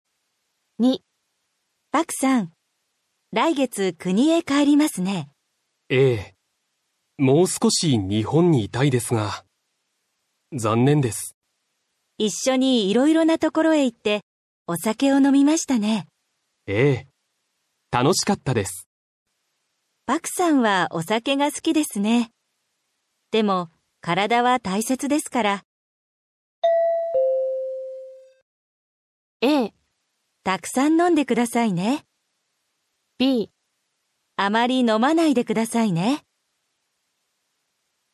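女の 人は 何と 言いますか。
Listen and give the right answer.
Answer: b. あまり 飲まないでくださいね。

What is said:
a. たくさん 飲んでくださいね。
b. あまり 飲まないでくださいね。

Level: 初級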